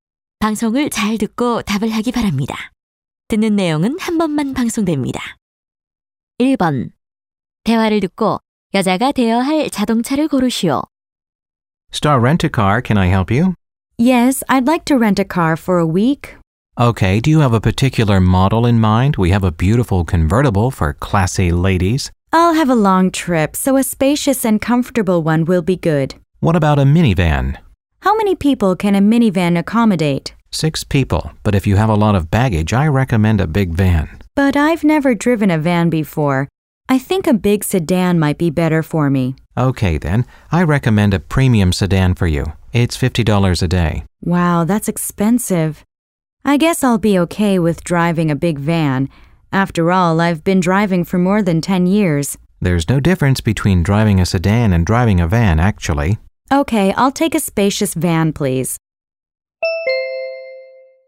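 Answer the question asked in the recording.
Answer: 큰 밴 (spacious van)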